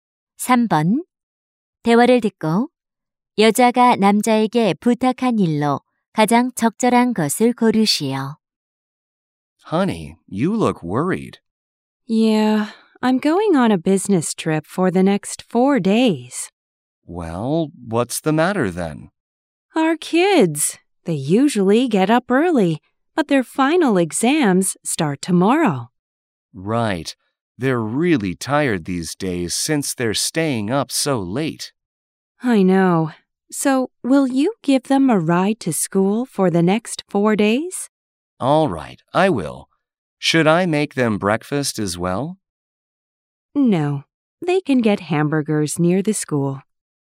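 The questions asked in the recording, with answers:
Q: 대화를 듣고 여자가 남자에게 부탁한 일로 가장 적절한 것을 고르시오.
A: 아이들을 학교에 태워다 주기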